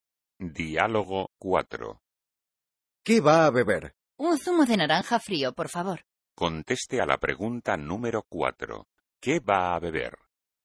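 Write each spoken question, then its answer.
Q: ¿Qué va a beber?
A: Un zumo de naranja frío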